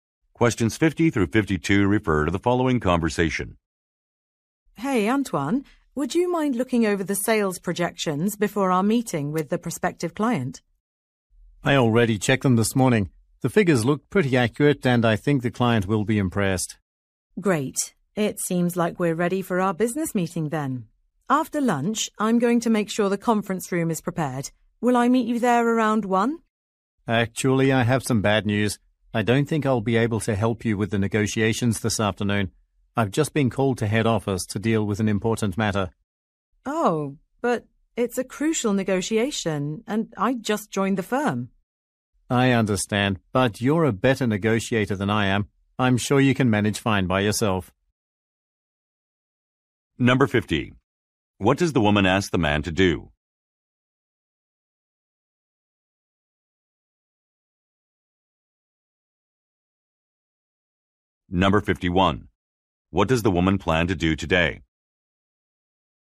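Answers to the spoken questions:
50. Look over the sales projections
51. Hold a business meeting with a prospective client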